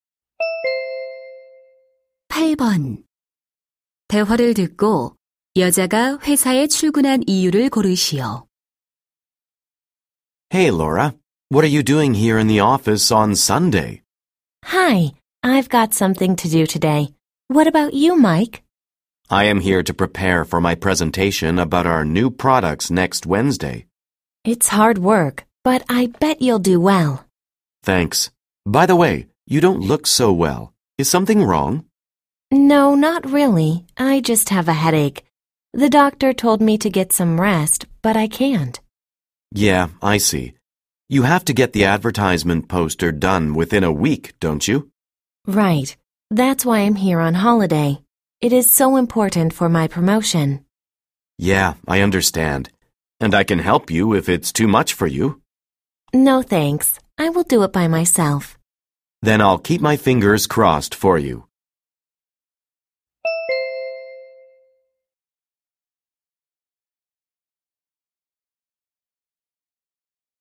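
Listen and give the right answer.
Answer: 광고 포스터를 완성하기 위해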